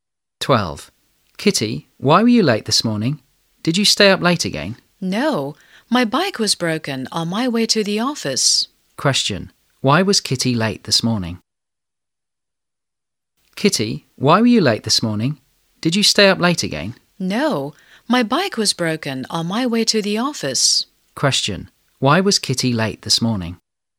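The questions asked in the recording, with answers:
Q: Question, why was Kitty late this morning?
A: Her bike was broken on her way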